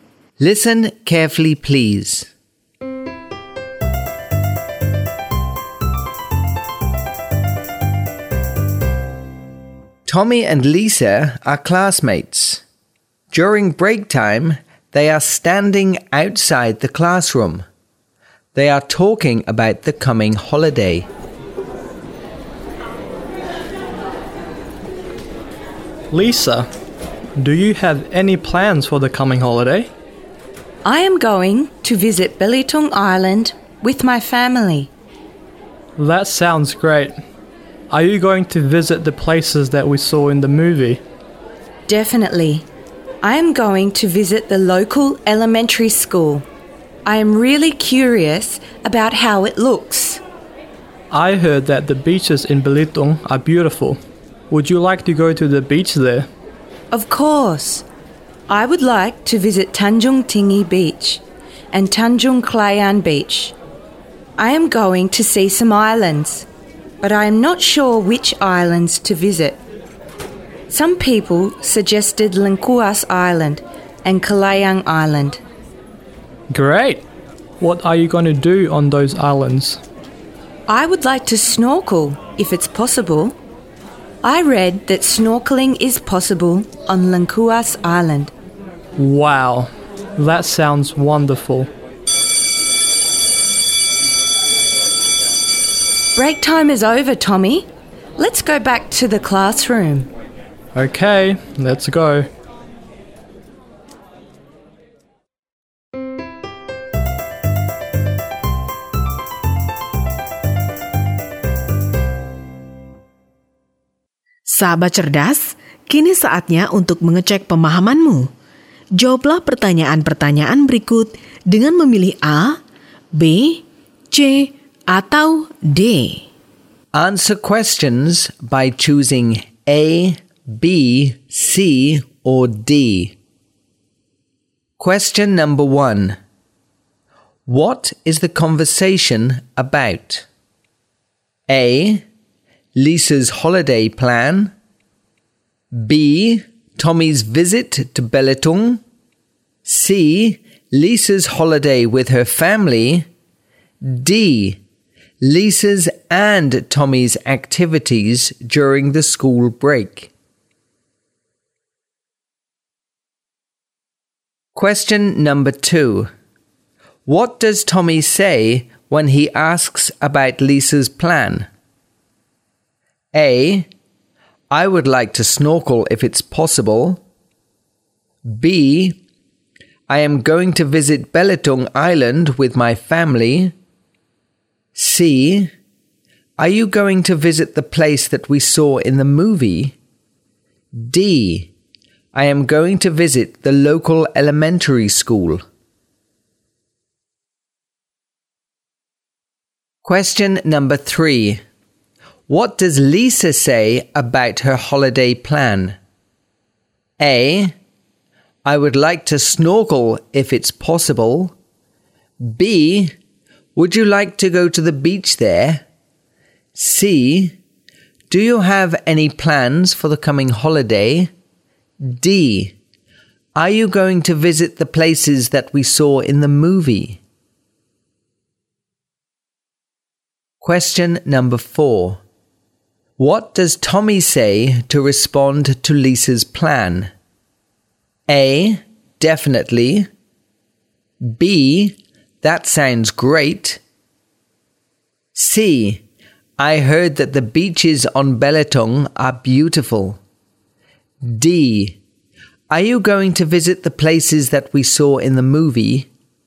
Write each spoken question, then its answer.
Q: What is the conversation about?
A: A. Lisa's holiday plan.

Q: What does Tommy say when he asks about Lisa's plan?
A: C. Are you going to visit the places that we saw in the movie?

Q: What does Lisa say about her holiday plan?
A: A. I would like to snorkel if it's possible.

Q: What does Tommy say to respond to Lisa's plan?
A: B. That sounds great.